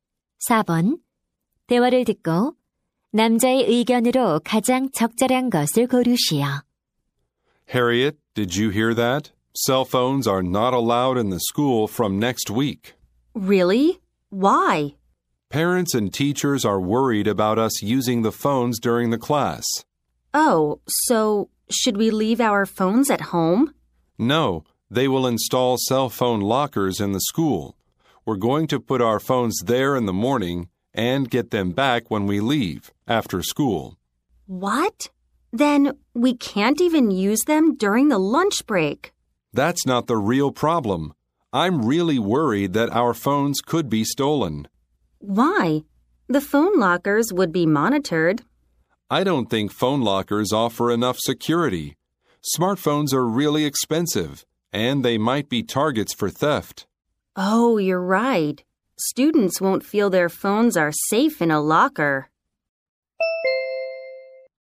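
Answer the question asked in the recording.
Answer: 휴대폰 보관함은 도난을 막을 만큼 안전하지 않다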